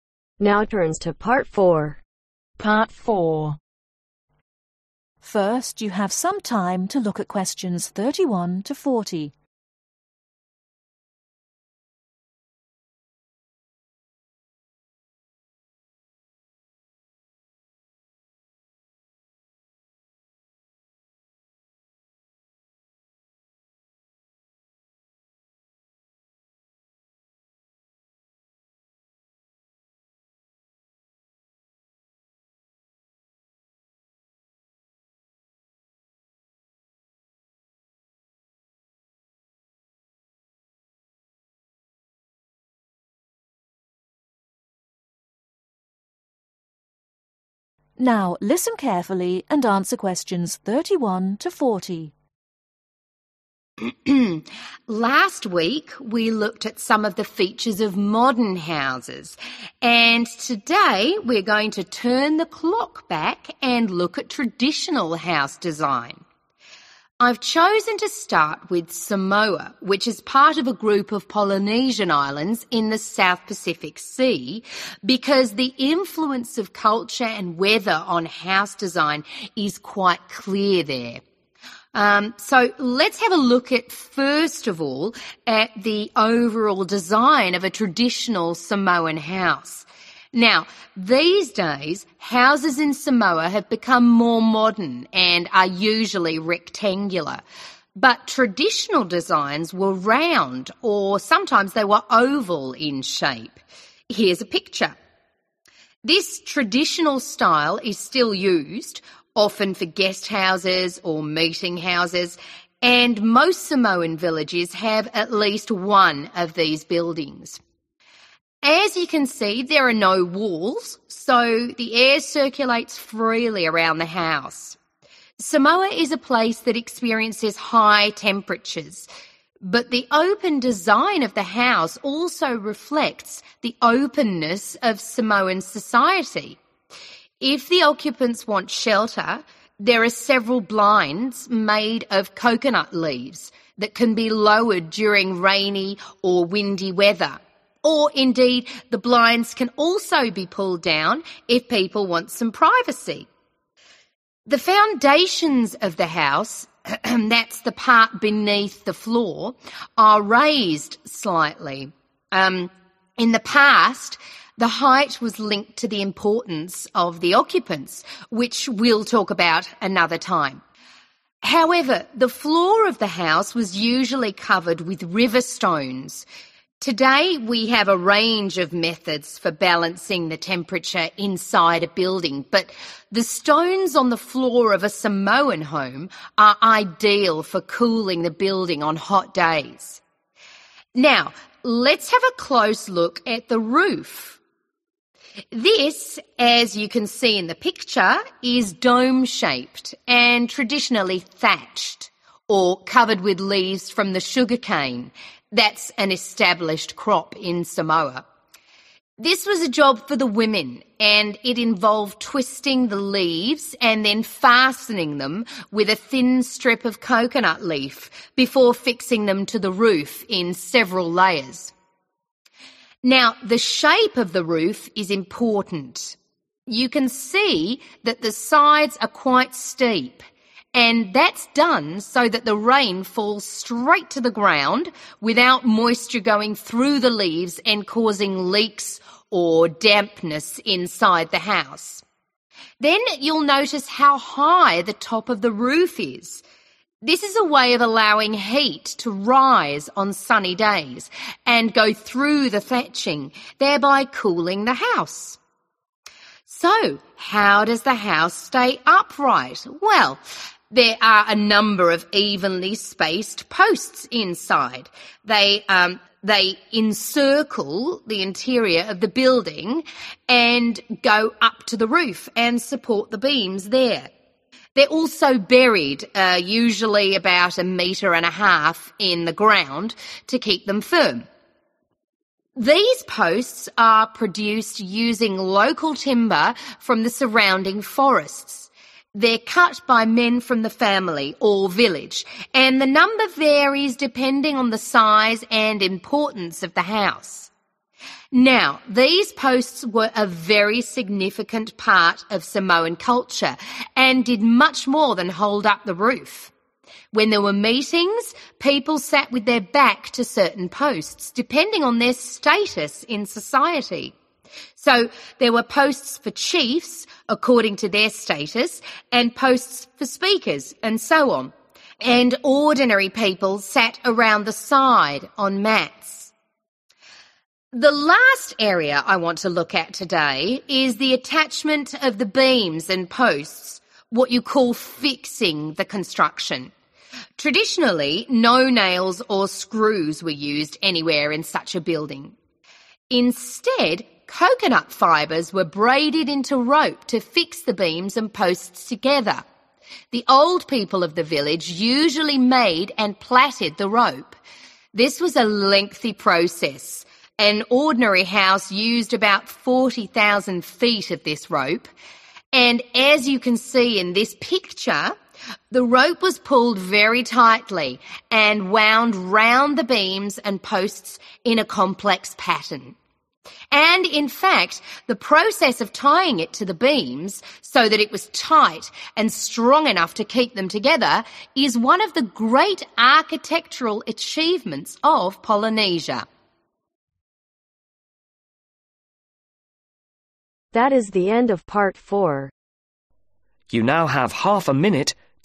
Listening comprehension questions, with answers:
Complete the notes below. Write NO MORE THAN TWO WORDS AND/OR A NUMBER for each answer.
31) house: round or (31) ............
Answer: oval/oval(-) shaped

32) (32) ............: to shelter occupants from wind and rain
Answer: blinds

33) floor: (33) ............ to control temperature roof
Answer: (river) stones

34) dome – shaped and thatched using (34) ............ leaves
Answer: sugar cane/sugar(-) cane

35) (35) ............ sides prevent dampness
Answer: steep

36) high too permits (36) ............ loss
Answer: heat

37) made using wood from the (37) ............ around the village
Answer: forest(s)

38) used to show (38) ............ of chiefs and speakers at meetings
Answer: status

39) attached using rope made by the (39) ............ in the village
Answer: old people

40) rope pulled tightly to from a (40) ............ around beams and posts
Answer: (complex) pattern